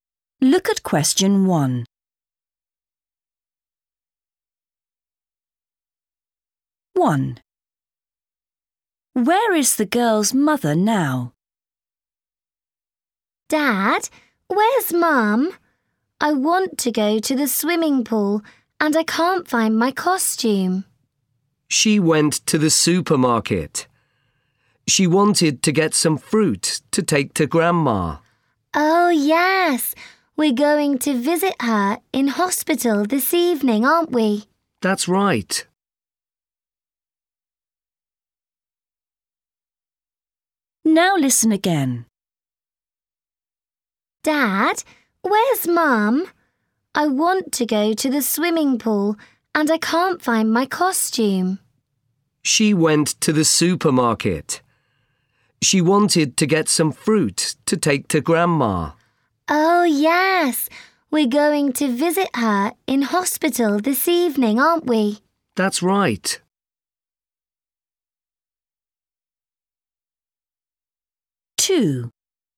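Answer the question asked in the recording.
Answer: at the supermarket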